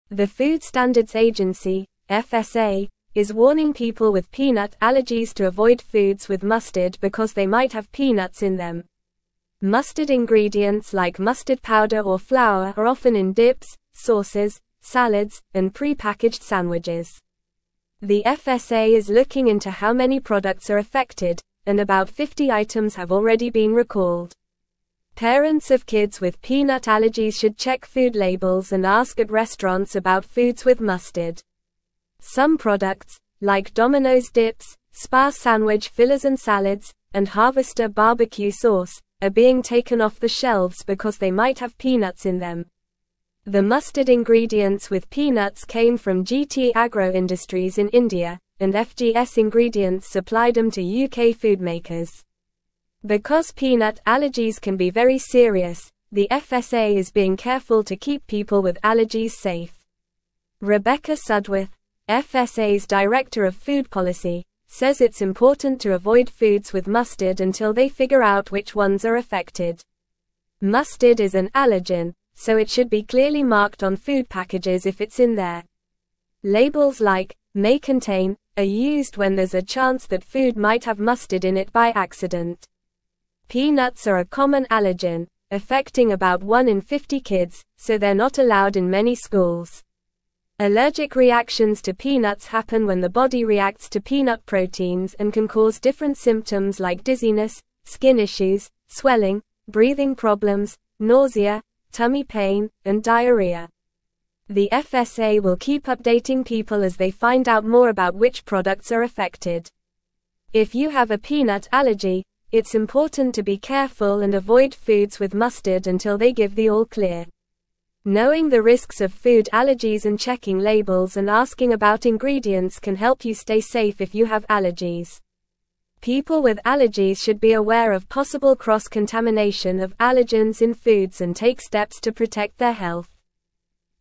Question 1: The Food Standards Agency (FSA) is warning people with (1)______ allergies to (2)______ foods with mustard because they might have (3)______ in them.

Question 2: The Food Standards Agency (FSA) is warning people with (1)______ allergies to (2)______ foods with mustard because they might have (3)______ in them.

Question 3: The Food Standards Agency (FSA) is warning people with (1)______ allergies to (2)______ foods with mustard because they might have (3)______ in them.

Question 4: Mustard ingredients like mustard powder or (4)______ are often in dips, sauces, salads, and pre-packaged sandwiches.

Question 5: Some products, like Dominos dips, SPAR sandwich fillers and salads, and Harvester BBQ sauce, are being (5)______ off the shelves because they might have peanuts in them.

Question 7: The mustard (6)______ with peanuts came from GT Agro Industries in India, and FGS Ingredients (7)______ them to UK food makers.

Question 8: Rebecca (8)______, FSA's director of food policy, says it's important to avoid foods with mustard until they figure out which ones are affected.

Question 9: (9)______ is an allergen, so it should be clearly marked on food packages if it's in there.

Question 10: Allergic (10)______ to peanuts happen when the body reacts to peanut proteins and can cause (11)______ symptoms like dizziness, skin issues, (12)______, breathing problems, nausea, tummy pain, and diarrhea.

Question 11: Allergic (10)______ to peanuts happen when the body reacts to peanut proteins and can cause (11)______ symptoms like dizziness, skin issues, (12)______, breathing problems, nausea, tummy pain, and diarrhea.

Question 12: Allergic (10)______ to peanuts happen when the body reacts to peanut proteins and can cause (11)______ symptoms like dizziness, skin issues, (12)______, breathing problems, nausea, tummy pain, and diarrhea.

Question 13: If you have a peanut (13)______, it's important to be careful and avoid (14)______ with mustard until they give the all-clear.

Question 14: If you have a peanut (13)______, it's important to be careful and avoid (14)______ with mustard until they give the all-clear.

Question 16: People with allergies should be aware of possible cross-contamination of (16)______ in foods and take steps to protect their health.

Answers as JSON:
{"1": "peanut", "2": "avoid", "3": "peanuts", "4": "flour", "5": "taken", "7": "supplied", "8": "Sudworth", "9": "Mustard", "10": "reactions", "11": "different", "12": "swelling", "13": "allergy", "14": "foods", "16": "allergens"}

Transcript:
The Food Standards Agency (FSA) is warning people with peanut allergies to avoid foods with mustard because they might have peanuts in them. Mustard ingredients like mustard powder or flour are often in dips, sauces, salads, and pre-packaged sandwiches. The FSA is looking into how many products are affected, and about 50 items have already been recalled. Parents of kids with peanut allergies should check food labels and ask at restaurants about foods with mustard.
Some products, like Dominos dips, SPAR sandwich fillers and salads, and Harvester BBQ sauce, are being taken off the shelves because they might have peanuts in them. The mustard ingredients with peanuts came from GT Agro Industries in India, and FGS Ingredients supplied them to UK food makers. Because peanut allergies can be very serious, the FSA is being careful to keep people with allergies safe. Rebecca Sudworth, FSA's director of food policy, says it's important to avoid foods with mustard until they figure out which ones are affected.
Mustard is an allergen, so it should be clearly marked on food packages if it's in there. Labels like "may contain" are used when there's a chance that food might have mustard in it by accident. Peanuts are a common allergen, affecting about 1 in 50 kids, so they're not allowed in many schools. Allergic reactions to peanuts happen when the body reacts to peanut proteins and can cause different symptoms like dizziness, skin issues, swelling, breathing problems, nausea, tummy pain, and diarrhea.
The FSA will keep updating people as they find out more about which products are affected. If you have a peanut allergy, it's important to be careful and avoid foods with mustard until they give the all-clear. Knowing the risks of food allergies and checking labels and asking about ingredients can help you stay safe if you have allergies. People with allergies should be aware of possible cross-contamination of allergens in foods and take steps to protect their health.

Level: Level 3